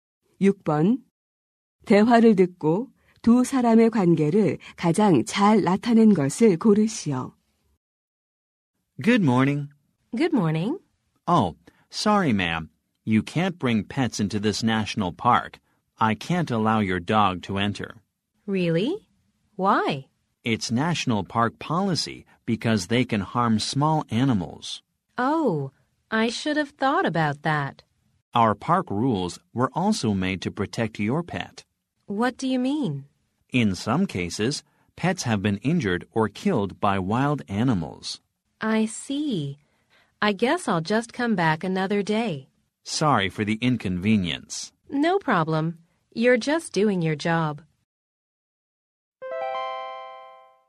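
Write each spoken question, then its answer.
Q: 대화를 듣고 두 사람의 관계를 가장 잘 나타낸 것을 고르시오.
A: 국립공원 직원 - 방문객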